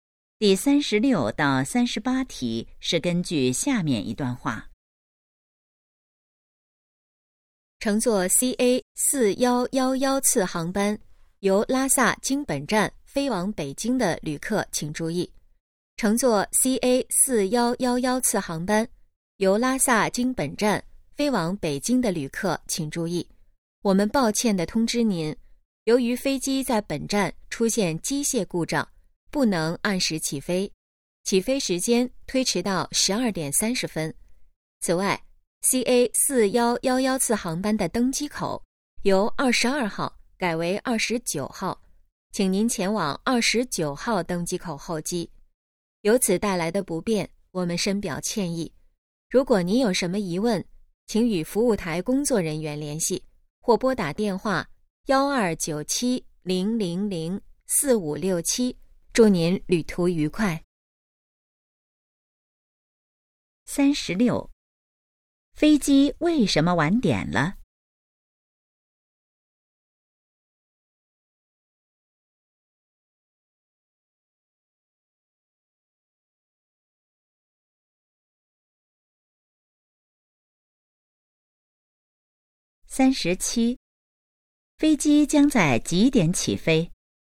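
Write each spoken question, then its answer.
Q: 飞机为什么晚点了?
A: 飞机出现机械故障

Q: 飞机将在几点起飞?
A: 12点30分

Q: 乘客应该在哪个登机口登机?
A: 29号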